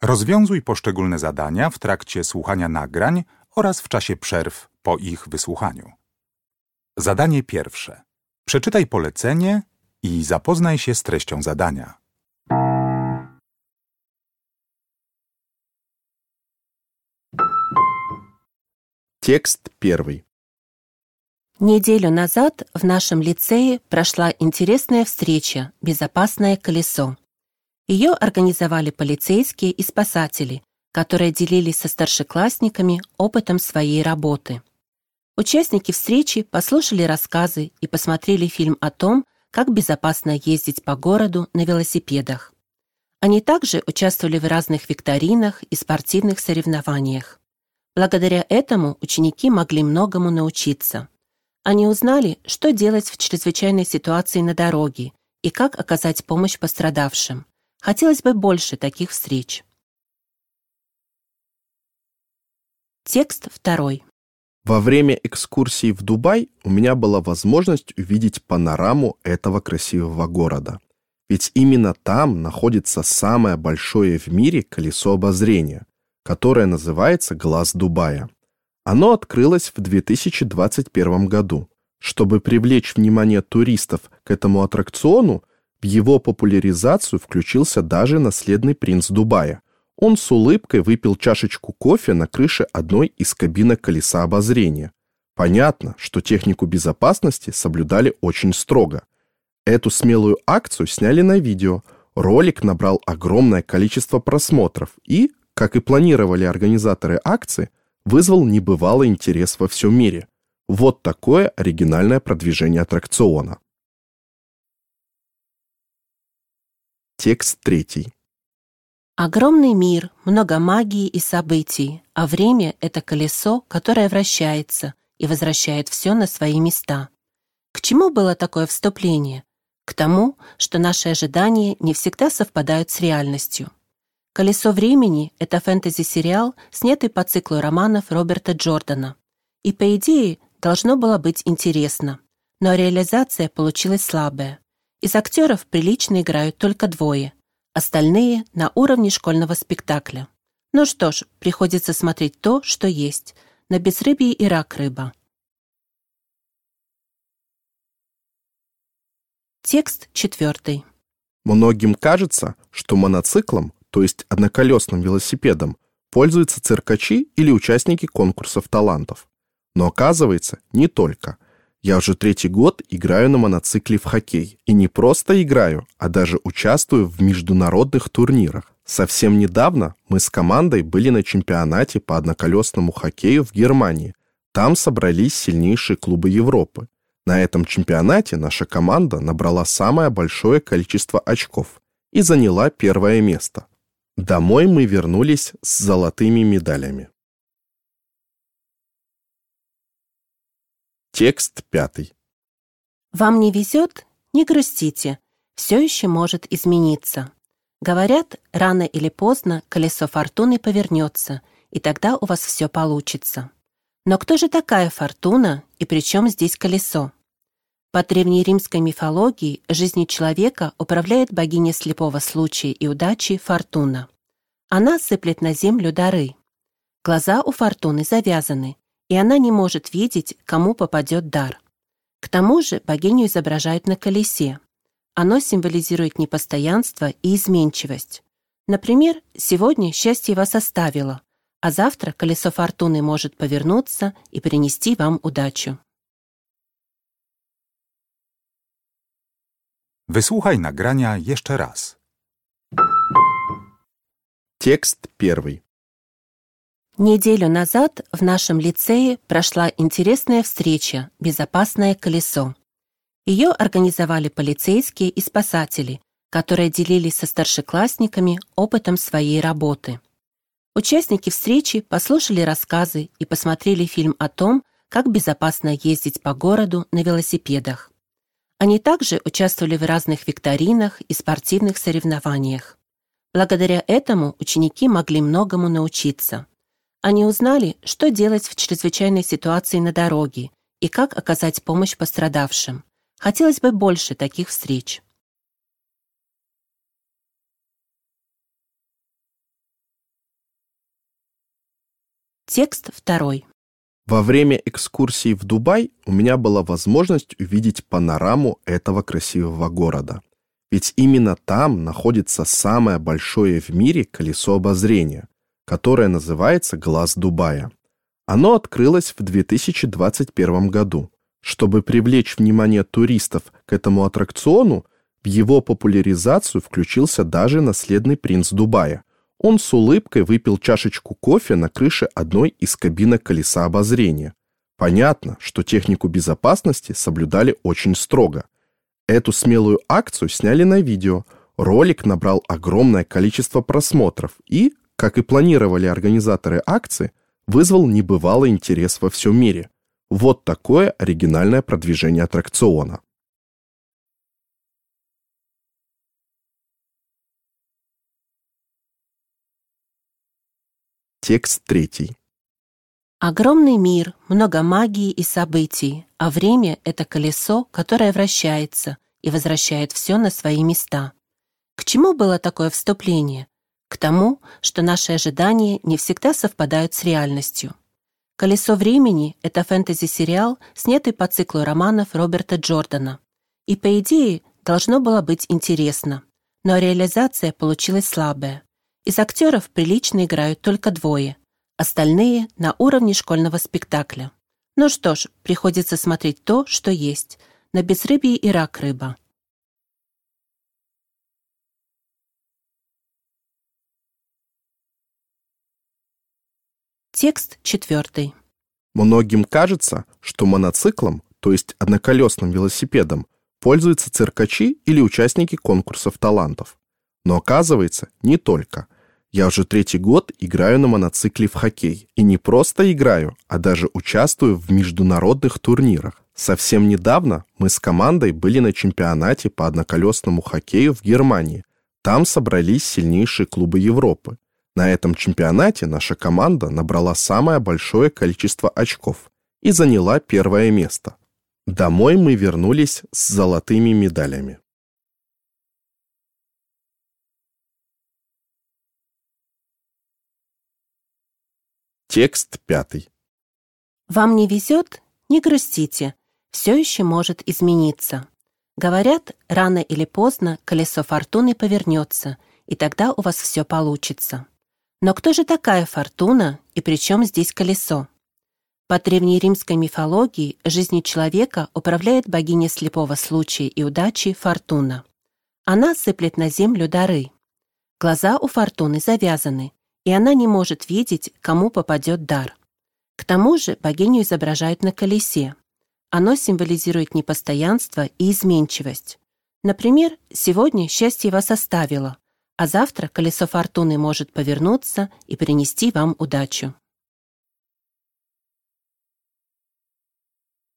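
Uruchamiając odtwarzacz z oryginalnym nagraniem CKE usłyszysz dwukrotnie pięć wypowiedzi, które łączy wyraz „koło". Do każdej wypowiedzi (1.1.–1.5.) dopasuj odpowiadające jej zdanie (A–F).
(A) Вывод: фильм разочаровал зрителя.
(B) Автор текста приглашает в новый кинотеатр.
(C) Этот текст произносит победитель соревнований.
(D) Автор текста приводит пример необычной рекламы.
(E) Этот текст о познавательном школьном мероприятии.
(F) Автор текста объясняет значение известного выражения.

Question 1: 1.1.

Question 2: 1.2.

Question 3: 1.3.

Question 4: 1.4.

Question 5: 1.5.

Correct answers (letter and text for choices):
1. (E) Этот текст о познавательном школьном мероприятии.
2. (D) Автор текста приводит пример необычной рекламы.
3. (A) Вывод: фильм разочаровал зрителя.
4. (C) Этот текст произносит победитель соревнований.
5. (F) Автор текста объясняет значение известного выражения.

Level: Poziom: podstawowy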